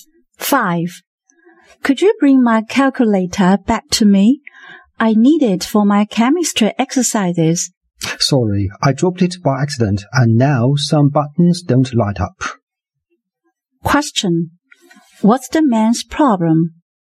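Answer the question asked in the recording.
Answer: He broke the woman's calculator.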